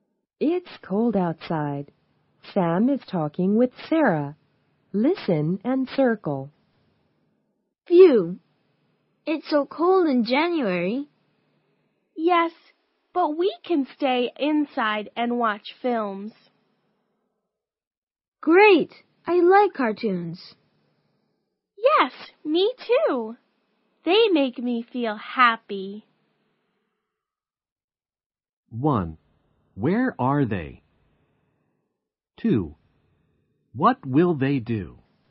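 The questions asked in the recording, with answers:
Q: What will they do?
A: Watch films (cartoons)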